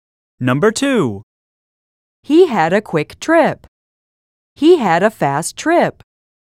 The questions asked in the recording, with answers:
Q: He had a quick trip. He had a fast trip.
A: Same is the correct answer.